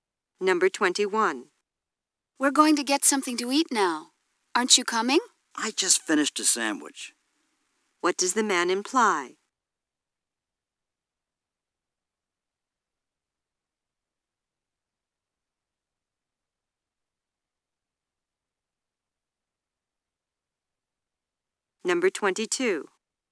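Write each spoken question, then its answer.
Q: What does the man imply?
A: He isn't hungry, so he won't come.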